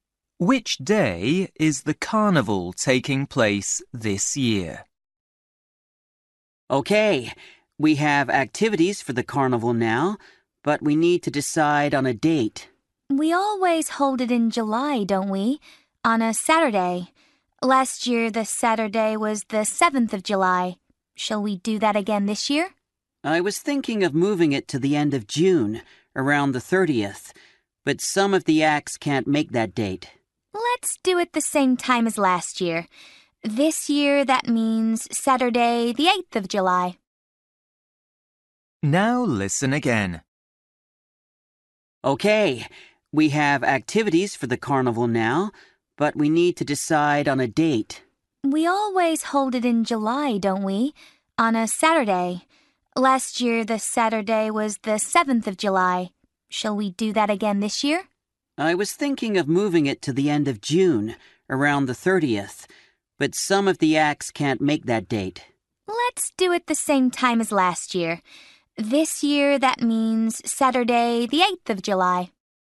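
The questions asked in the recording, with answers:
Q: Which day is the carnival taking place this year?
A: Saturday, the 8th of July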